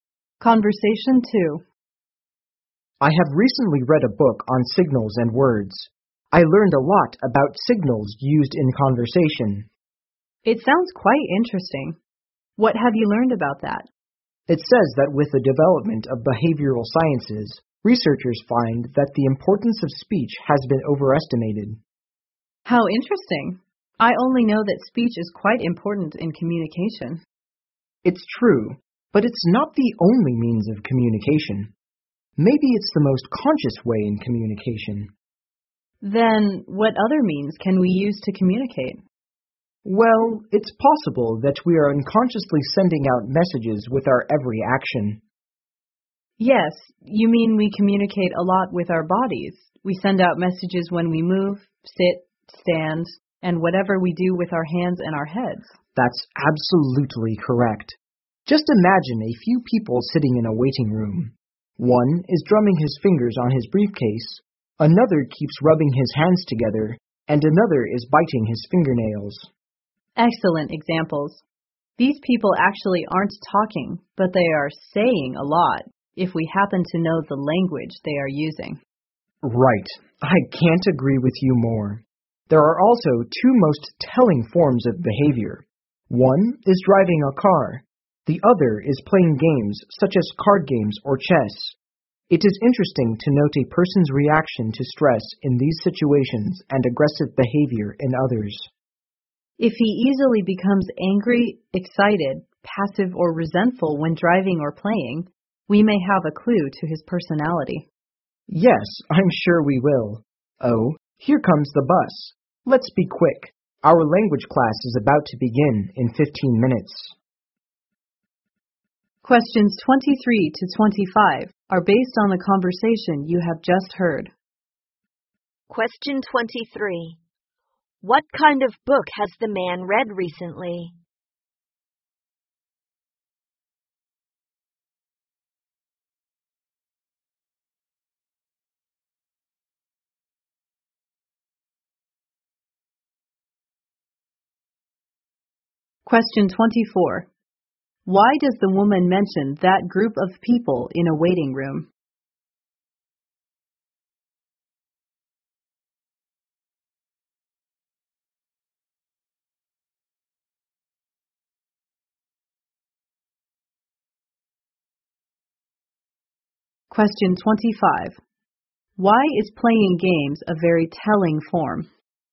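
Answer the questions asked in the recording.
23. A book on signals and words used in communication
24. To show that people communicate through body movements
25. How a person reacts to stress in games gives a clue to his personality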